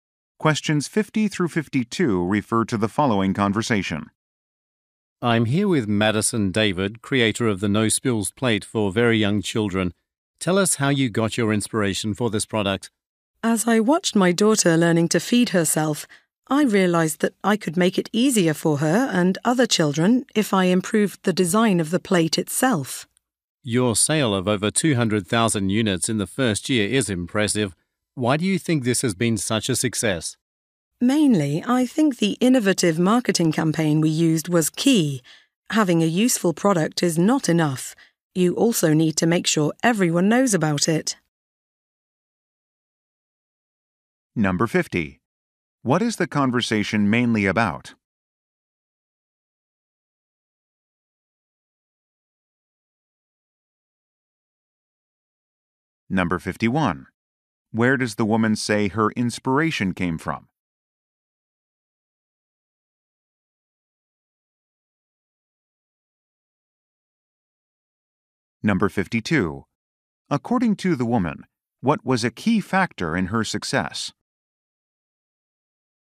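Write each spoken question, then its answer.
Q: What is the conversation mainly about?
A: A new plate for young children

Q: Where does the woman say her inspiration came from?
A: Watching her daughter learn to feed herself

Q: According to the woman, what was a key factor in her success?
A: An innovative marketing campaign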